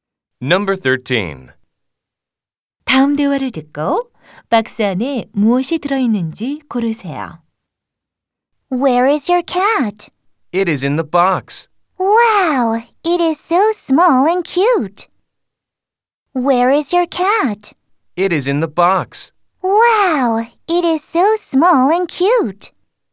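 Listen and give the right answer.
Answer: 고양이 (cat)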